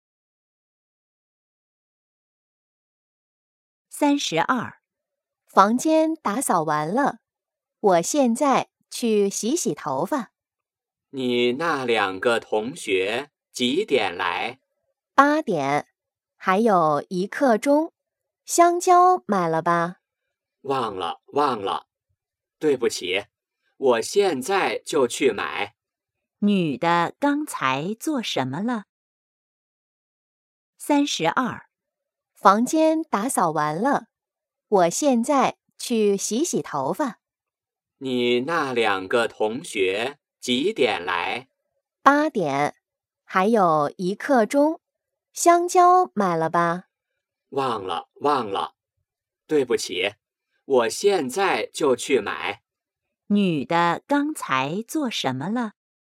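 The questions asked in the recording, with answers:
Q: 女的刚才做什么了?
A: 打扫房间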